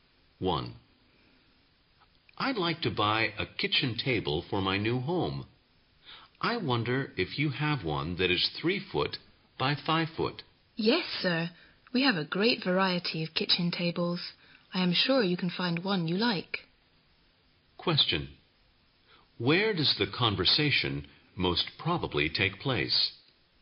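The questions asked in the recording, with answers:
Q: Where does the conversation most probably take place?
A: In a furniture store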